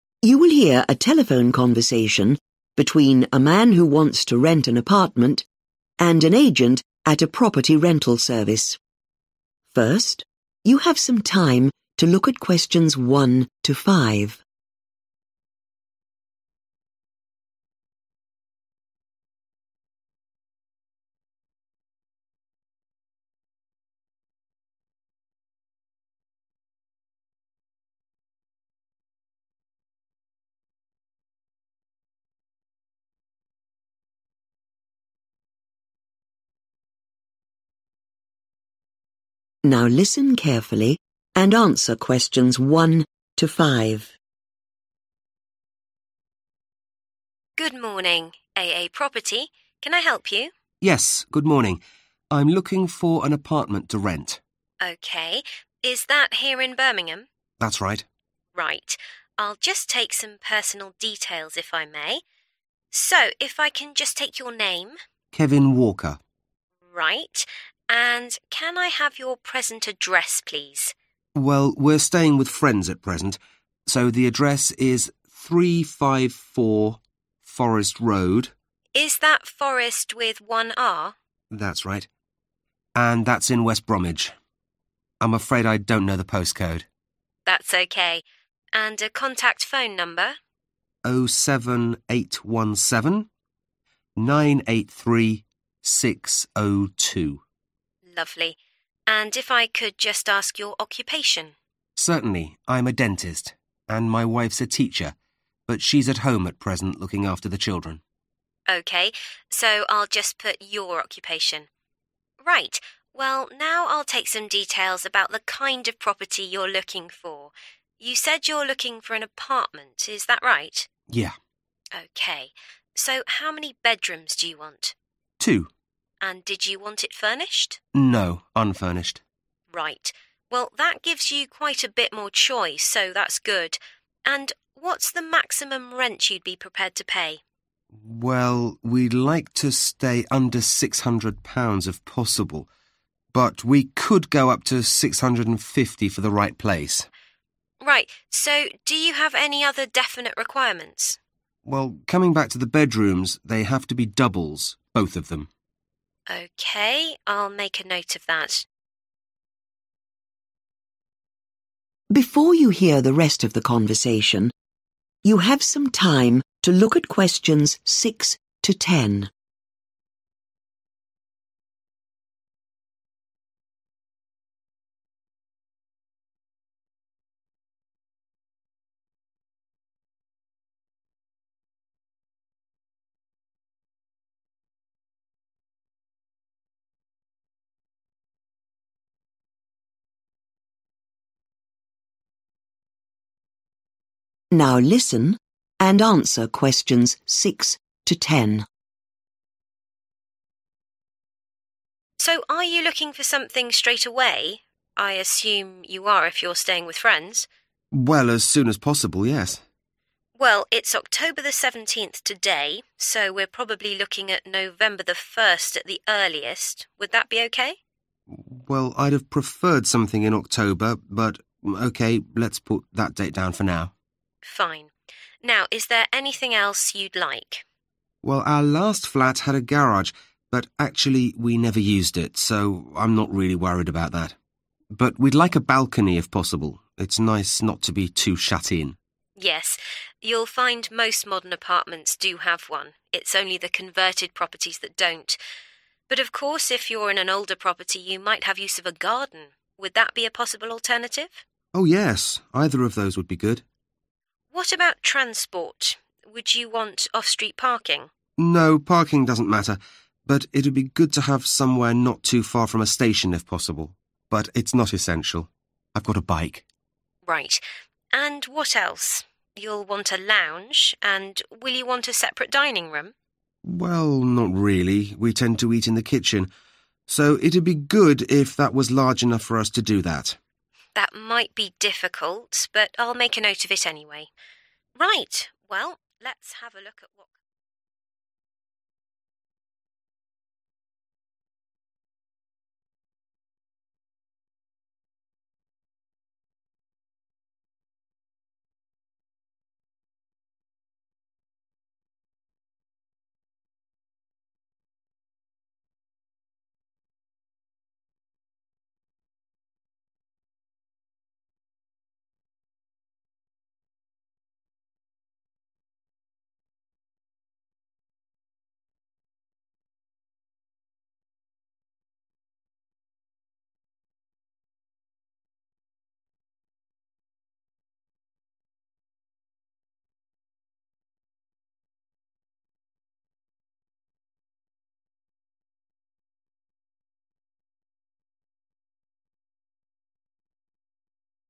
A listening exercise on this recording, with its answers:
Complete the notes below. Write ONE WORD AND/OR A NUMBER for each answer.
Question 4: __________ apartment to rent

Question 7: __________ or a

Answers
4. unfurnished
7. balcony